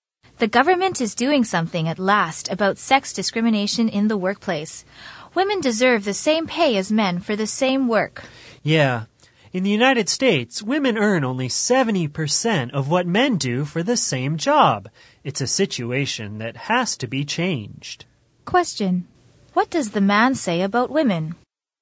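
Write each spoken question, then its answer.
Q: What does the man say about women?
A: Women in the US earn only 70% of what men earn for the same job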